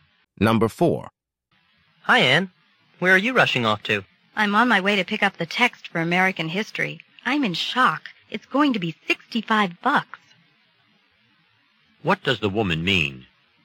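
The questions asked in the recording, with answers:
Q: What does the woman mean?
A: The American History textbook is surprisingly expensive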